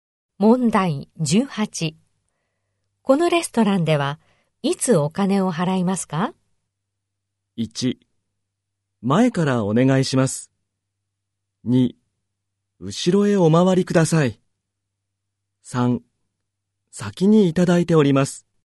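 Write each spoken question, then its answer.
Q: このレストランではいつお金を払いますか?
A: 3: 先にいただいております。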